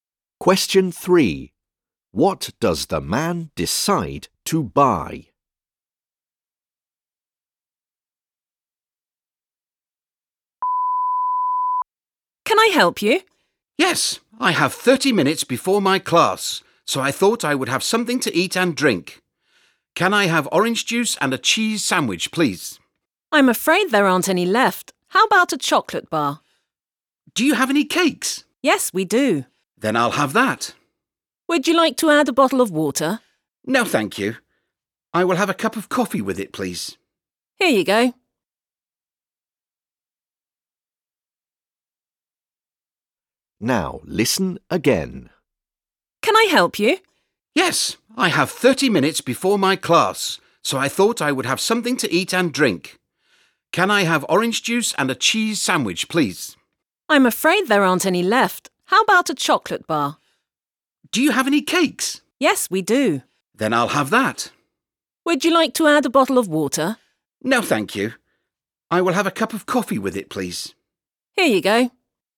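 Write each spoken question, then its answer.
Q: What does the man decide to buy?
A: A cake and a cup of coffee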